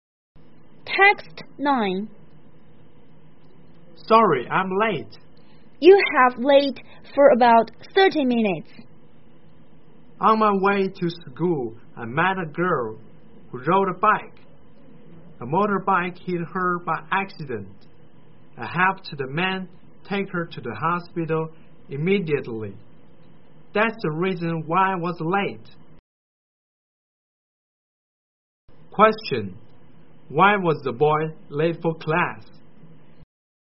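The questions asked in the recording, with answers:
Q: Why was the boy late for class?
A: He helped take a girl hit by a motorbike to the hospital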